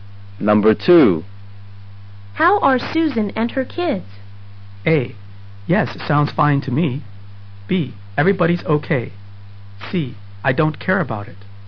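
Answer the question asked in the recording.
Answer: B: Everybody's okay.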